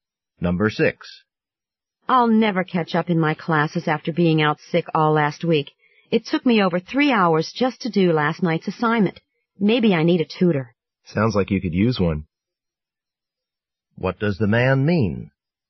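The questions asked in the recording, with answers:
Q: What does the man mean?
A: He agrees that she should get a tutor.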